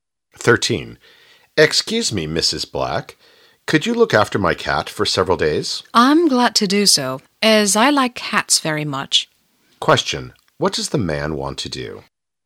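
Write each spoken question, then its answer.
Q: What does the man want to do?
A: Ask Mrs. Black to look after his cat for several days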